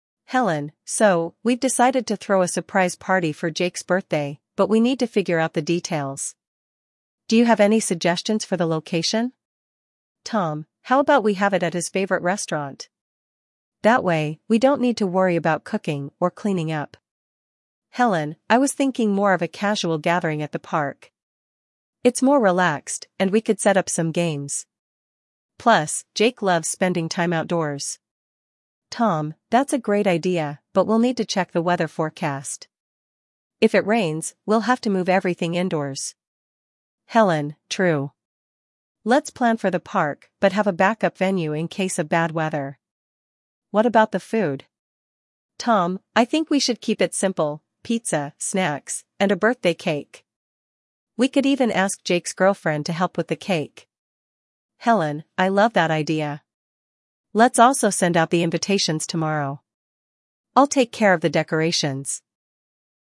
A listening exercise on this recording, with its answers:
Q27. What type of venue does Helen suggest for the party?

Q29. What issue does Helen acknowledge regarding the park?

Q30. What food items do Tom and Helen agree on?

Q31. What is Helen's plan for the party invitations?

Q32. What will Helen take care of for the party?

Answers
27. Park
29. Weather issues
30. Pizza and snacks
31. Send invitations tomorrow
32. Decorations

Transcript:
Helen: So, we've decided to throw a surprise party for Jake's birthday, but we need to figure out the details. Do you have any suggestions for the location?
Tom: How about we have it at his favorite restaurant? That way, we don't need to worry about cooking or cleaning up.
Helen: I was thinking more of a casual gathering at the park. It's more relaxed, and we could set up some games. Plus, Jake loves spending time outdoors.
Tom: That's a great idea, but we'll need to check the weather forecast. If it rains, we'll have to move everything indoors.
Helen: True. Let's plan for the park but have a backup venue in case of bad weather. What about the food?
Tom: I think we should keep it simple—pizza, snacks, and a birthday cake. We could even ask Jake's girlfriend to help with the cake.
Helen: I love that idea. Let's also send out the invitations tomorrow. I'll take care of the decorations.